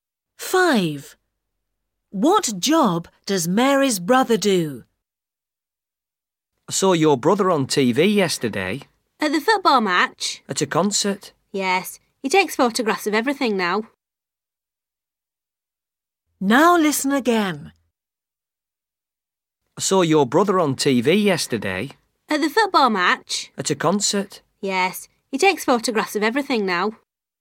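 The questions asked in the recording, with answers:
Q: What job does Mary's brother do?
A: He is a photographer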